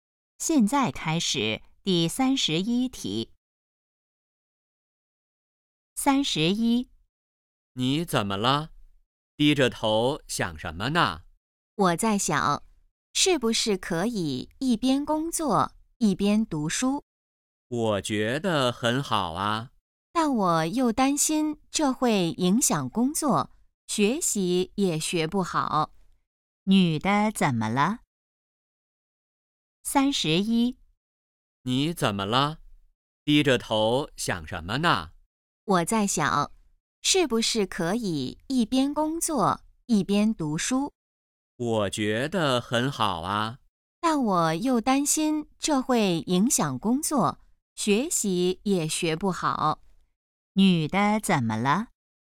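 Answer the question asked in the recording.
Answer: 在考虑要不要一边工作一边读书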